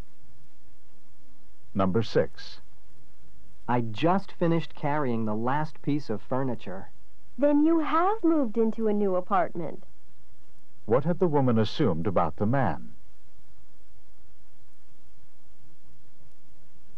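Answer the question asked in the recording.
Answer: That he hadn't moved into a new apartment.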